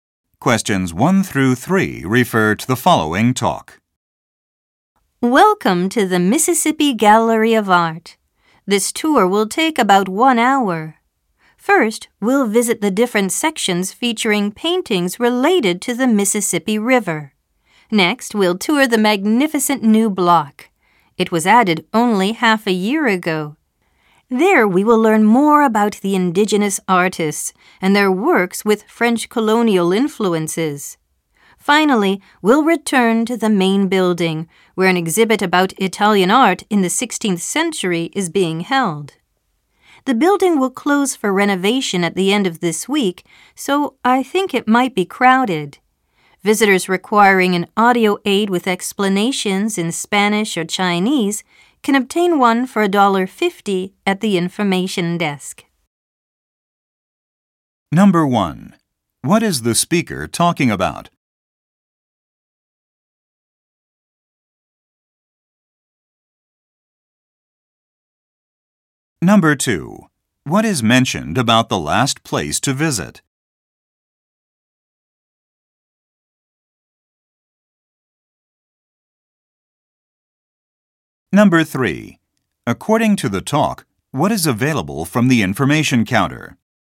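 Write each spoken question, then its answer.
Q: What is the speaker talking about?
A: A tour of the Mississippi Gallery of Art

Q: What is mentioned about the last place to visit?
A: It might be crowded because the building will close for renovation at the end of the week

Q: According to the talk, what is available from the information counter?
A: Audio aids with explanations in Spanish or Chinese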